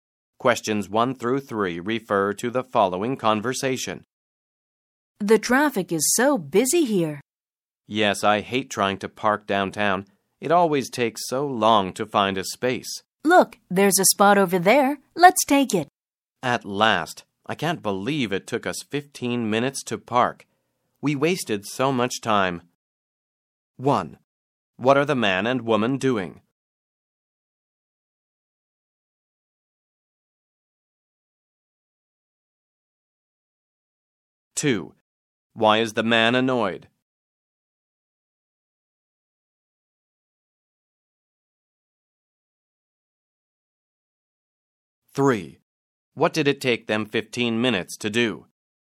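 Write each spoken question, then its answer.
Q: What are the man and woman doing?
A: Looking for a parking space downtown

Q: What did it take them 15 minutes to do?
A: Park (find a parking space)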